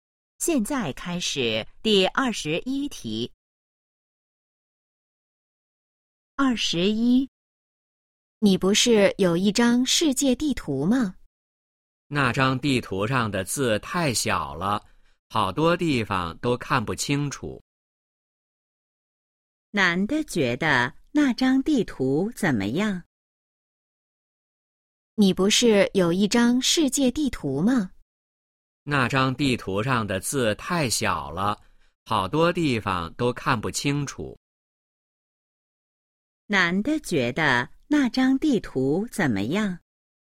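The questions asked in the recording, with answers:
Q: 男的觉得那张地图怎么样?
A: 字太小,看不清楚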